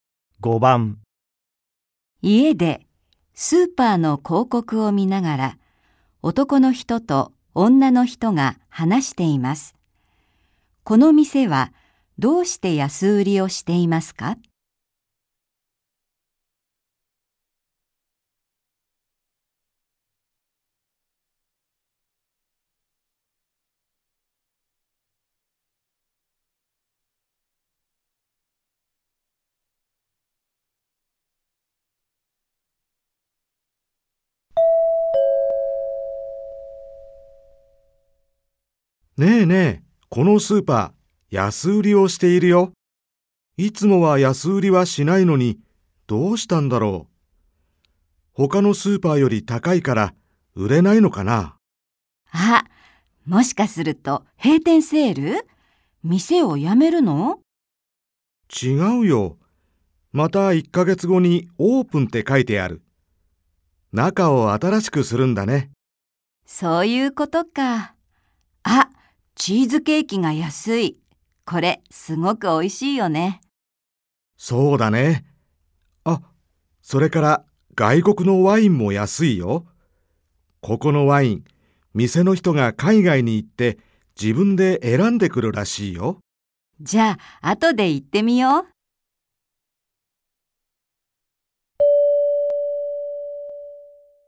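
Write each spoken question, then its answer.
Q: この店はどうして安売りをしていますか?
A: 店の中を新しくするから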